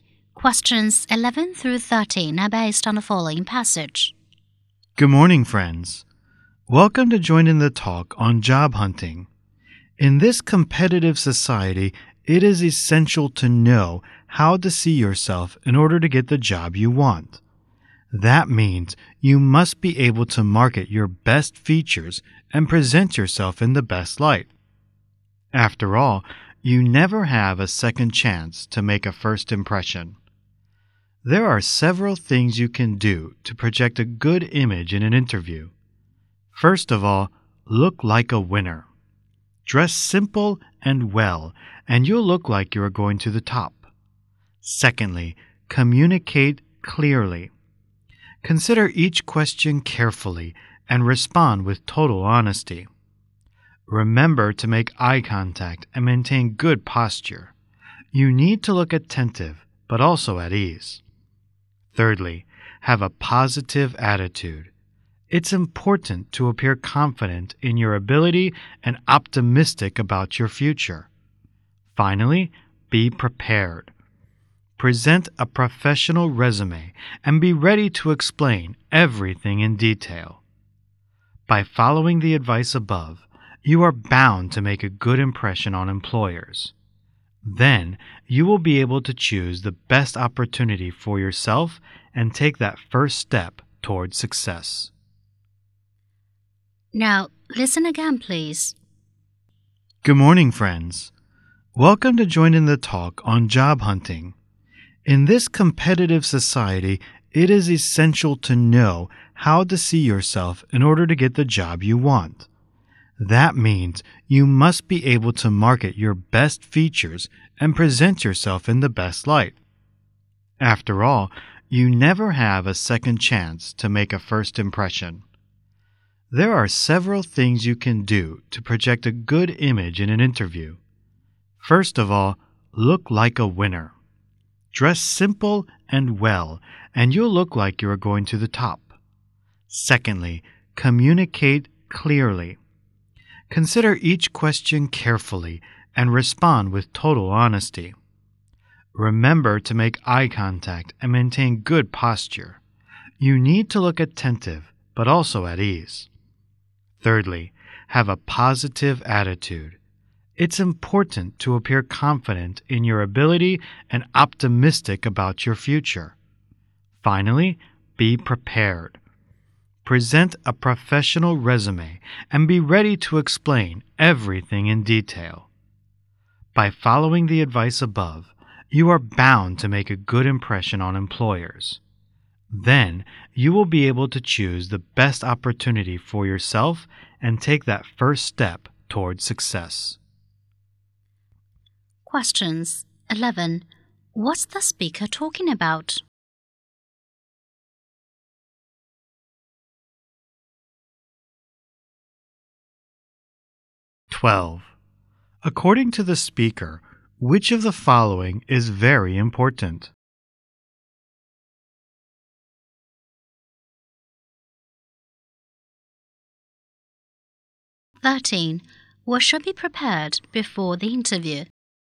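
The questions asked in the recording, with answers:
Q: What's the speaker talking about?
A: How to make a good impression in a job interview

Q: What should be prepared before the interview?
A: A professional resume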